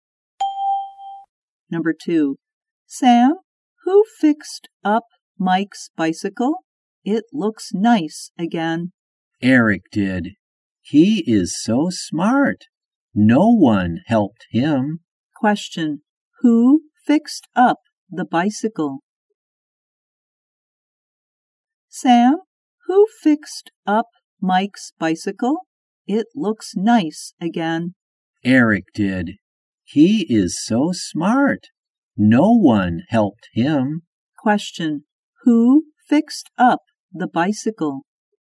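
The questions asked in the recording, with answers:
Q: Question, who fixed up the bicycle?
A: Eric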